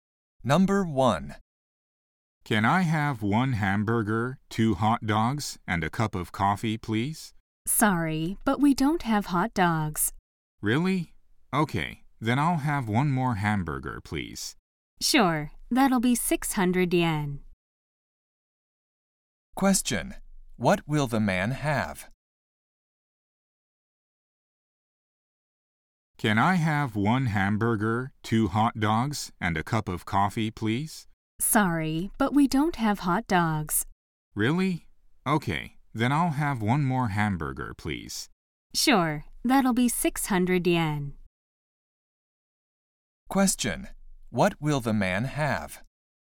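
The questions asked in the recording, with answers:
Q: What will the man have?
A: Two hamburgers and a cup of coffee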